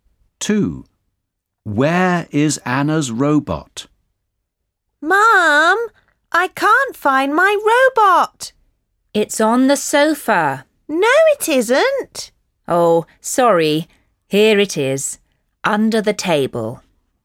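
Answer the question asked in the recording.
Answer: under the table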